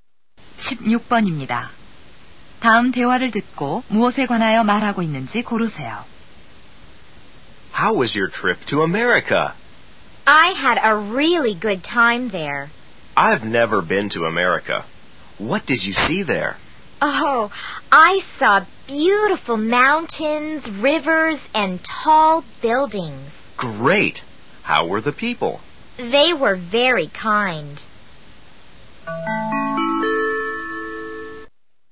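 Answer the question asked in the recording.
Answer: 미국 여행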